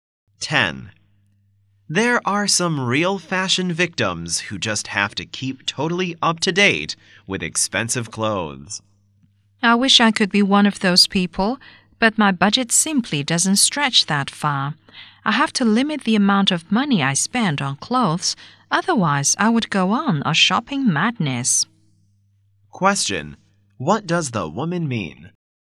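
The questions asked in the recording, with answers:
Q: What does the woman mean?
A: She can't afford to keep up with expensive fashion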